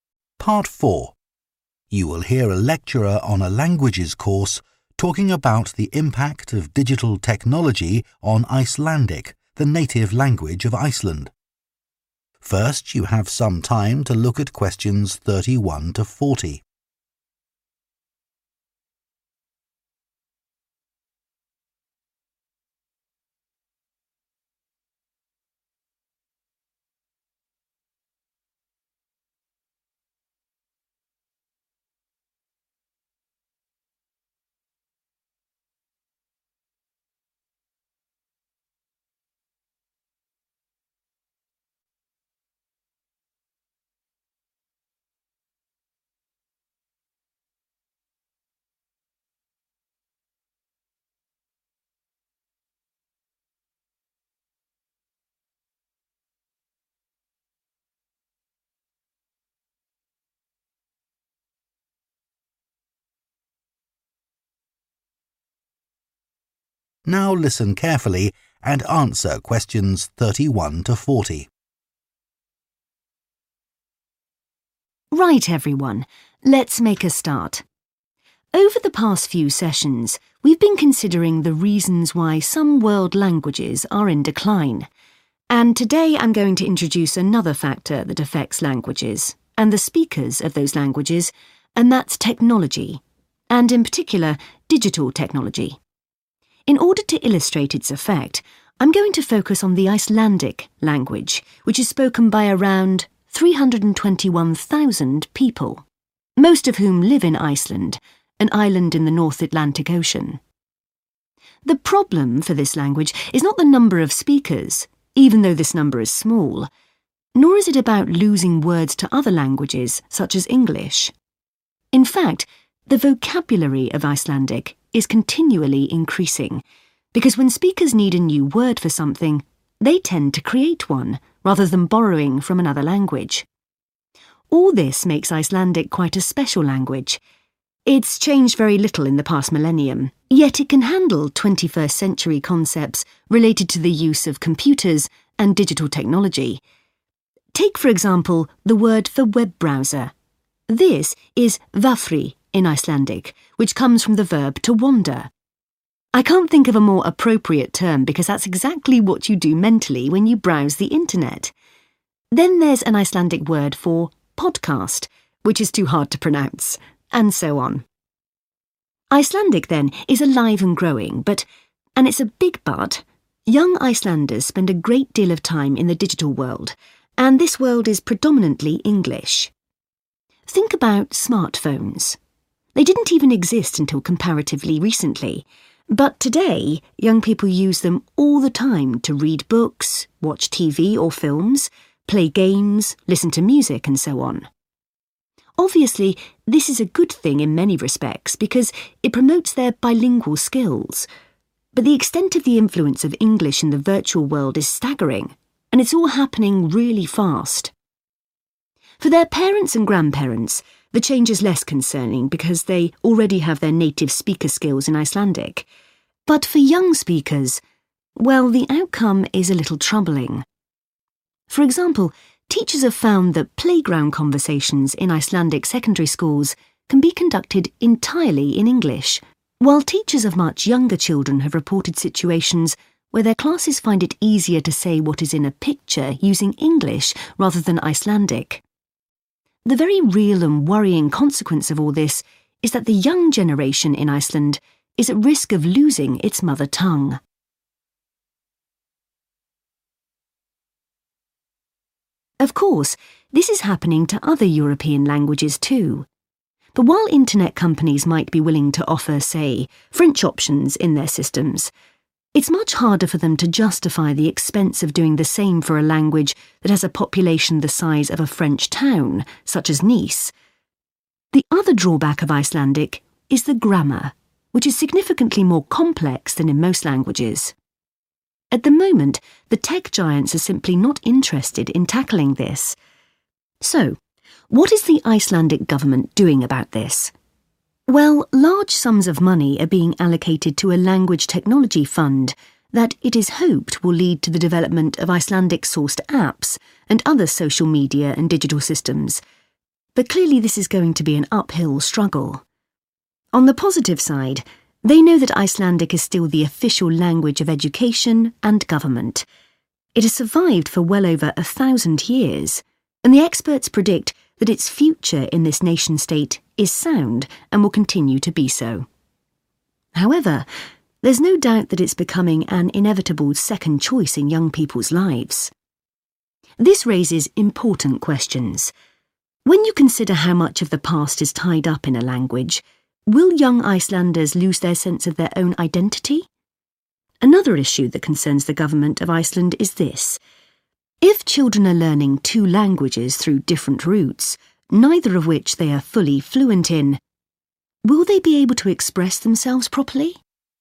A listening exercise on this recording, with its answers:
Complete the notes below. Write ONE WORD AND/OR A NUMBER for each answer.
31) has approximately 31 speakers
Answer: 321,000

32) has a 32 that is still growing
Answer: vocabulary

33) has its own words for computer-based concepts, such as web browser and 33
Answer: podcast

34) are big users of digital technology, such as 34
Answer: smartphones

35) are becoming 35 very quickly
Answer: bilingual

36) are having discussions using only English while they are in the 36 at school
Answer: playground

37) are better able to identify the content of a 37 in English than Icelandic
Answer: picture

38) write very little in Icelandic because of the small number of speakers and because of how complicated its 38 is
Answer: grammar

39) is worried that young Icelanders may lose their 39 as Icelanders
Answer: identity

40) is worried about the consequences of children not being 40 in either Icelandic or English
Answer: fluent